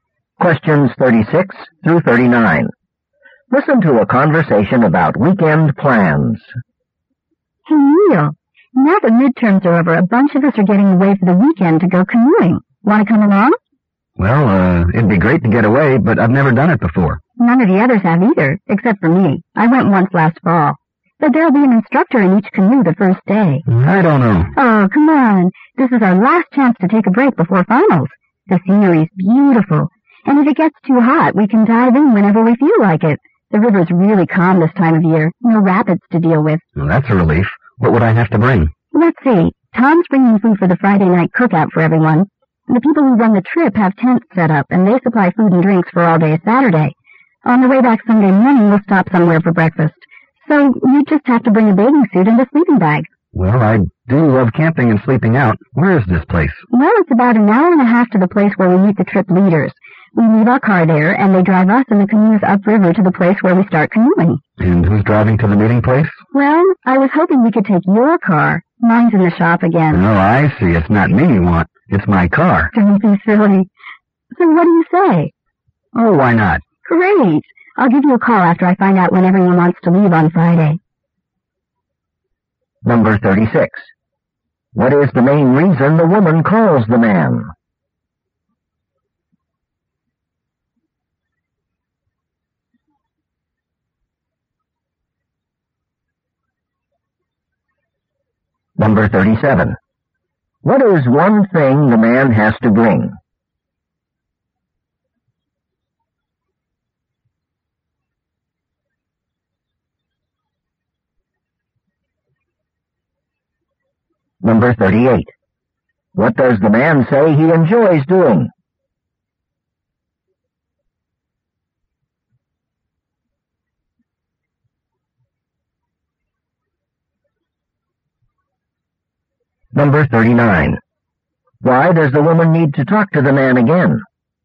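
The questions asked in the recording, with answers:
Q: What is the main reason the woman calls the man?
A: To invite him on a weekend canoe trip

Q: What is one thing the man has to bring?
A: A bathing suit or a sleeping bag

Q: What does the man say he enjoys doing?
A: Camping and sleeping out

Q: Why does the woman need to talk to the man again?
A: To tell him when they'll leave on Friday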